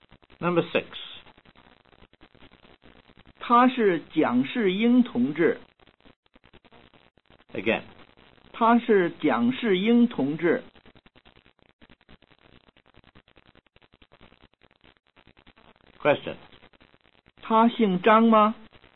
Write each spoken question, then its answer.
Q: 她姓张吗?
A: 他不姓张,他姓蒋。